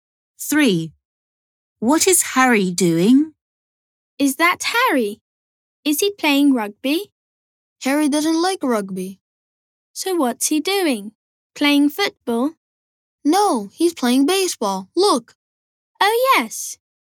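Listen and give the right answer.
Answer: playing baseball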